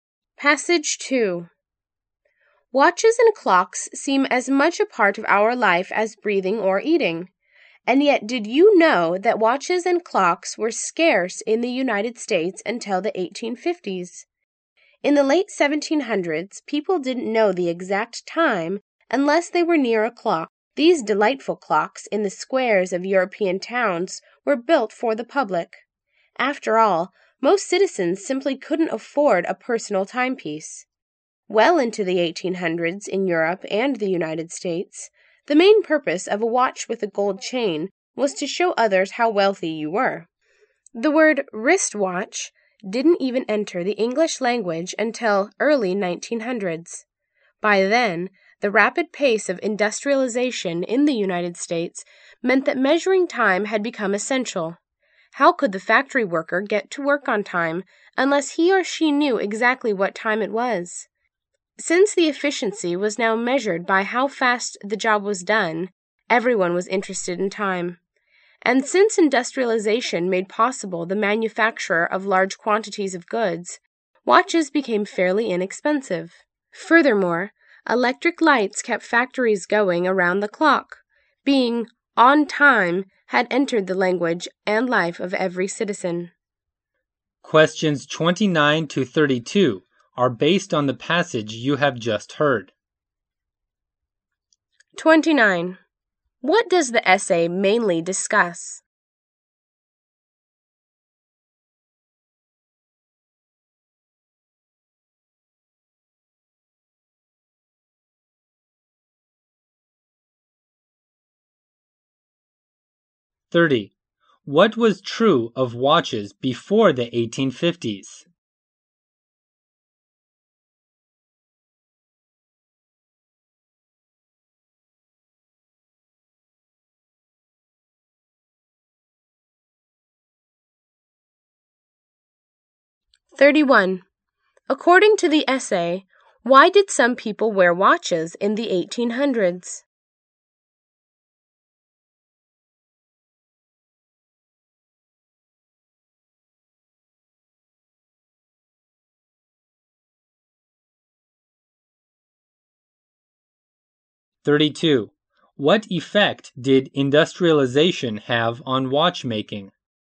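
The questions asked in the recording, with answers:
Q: What does the essay mainly discuss?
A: How watches and clocks became common in the United States

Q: What was true of watches before the 1850s?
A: They were scarce

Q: According to the essay, why did some people wear watches in the 1800s?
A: To show how wealthy they were

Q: What effect did industrialization have on watchmaking?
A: Watches became fairly inexpensive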